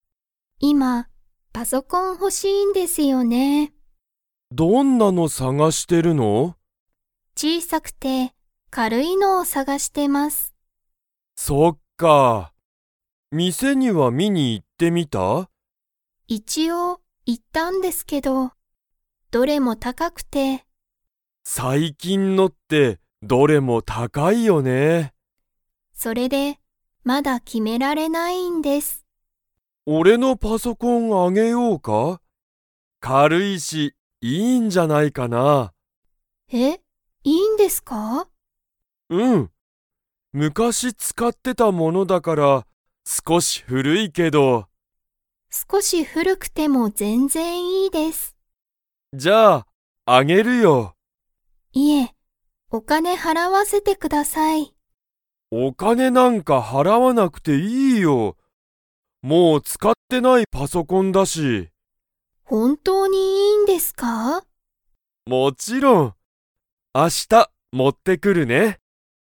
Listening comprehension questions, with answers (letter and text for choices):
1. 山田やまださんは、お店みせにパソコンを 。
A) 見みに行いった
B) 見みに行いってない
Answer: A) 見みに行いった

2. 斉藤さいとうさんは、いつパソコンを持もってきますか?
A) 今日きょう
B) 明日あした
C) 3日みっか後ご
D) 日曜日にちようび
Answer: B) 明日あした

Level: Level 3